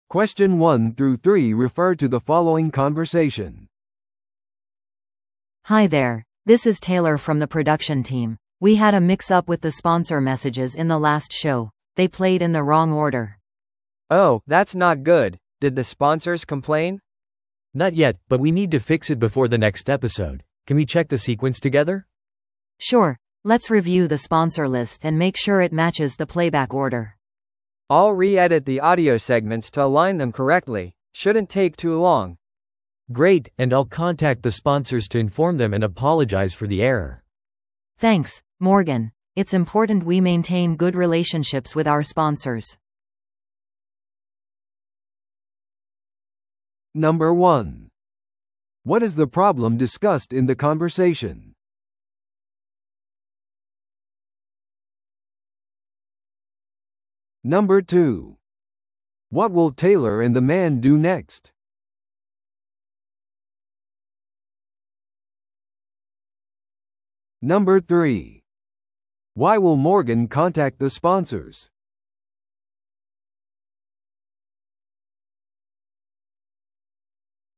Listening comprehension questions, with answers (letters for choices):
Listen to the audio below and answer the questions.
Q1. What is the problem discussed in the conversation?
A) 音声セグメントが長すぎた。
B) ショーが否定的なフィードバックを受けた。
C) スポンサーメッセージが間違った順序で再生された。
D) 制作チームが録音セッションを逃した。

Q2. What will Taylor and the man do next?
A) 混乱を謝罪するためにショーのリスナーに連絡を取る。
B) スポンサーメッセージの正しい順序を確認して確認する。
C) 将来のショーについて話し合うためにスポンサーとのミーティングをスケジュールする。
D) ショーのホストのために新しい台本を用意する。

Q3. Why will Morgan contact the sponsors?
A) 彼らのメッセージ用に次の録音セッションをスケジュールするため。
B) ショーのスポンサーのための新しい音声セグメントを取得するため。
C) スポンサー料金の増加の可能性について話し合うため。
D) ミスを知らせ、謝罪するため。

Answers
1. C
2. B
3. D

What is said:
A: Hi there, this is Taylor from the production team. We had a mix-up with the sponsor messages in the last show. They played in the wrong order.
B: Oh, that's not good. Did the sponsors complain?
C: Not yet, but we need to fix it before the next episode. Can we check the sequence together?
A: Sure, let's review the sponsor list and make sure it matches the playback order.
B: I'll re-edit the audio segments to align them correctly. Shouldn't take too long.
C: Great, and I'll contact the sponsors to inform them and apologize for the error.
A: Thanks, Morgan. It's important we maintain good relationships with our sponsors.